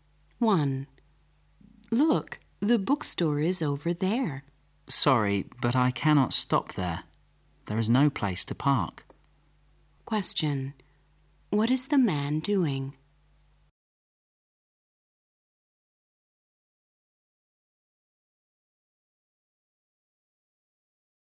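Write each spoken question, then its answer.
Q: What is the man doing?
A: Driving a car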